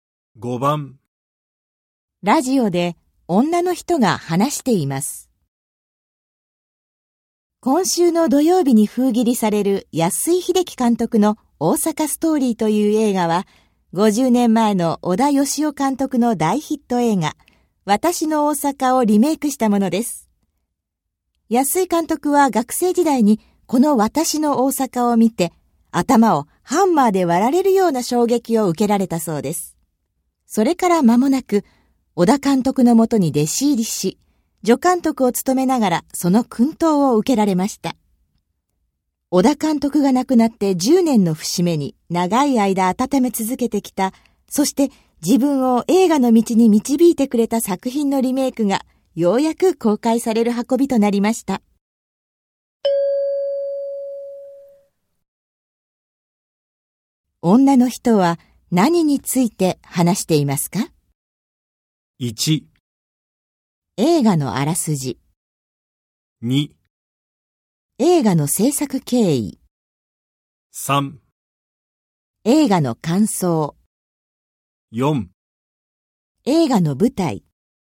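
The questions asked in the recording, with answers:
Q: 女の人は、何について話していますか?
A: 2: 映画の制作経緯。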